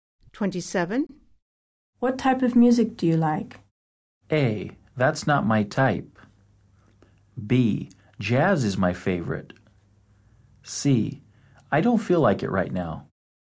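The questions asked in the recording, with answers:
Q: What type of music do you like?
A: B: Jazz is my favorite.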